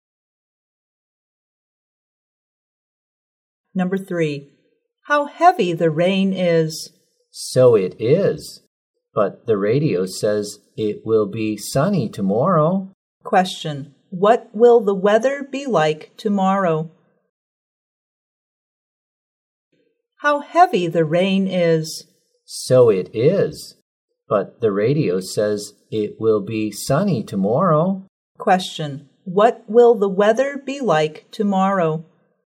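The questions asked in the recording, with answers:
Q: what will the weather be like tomorrow?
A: Sunny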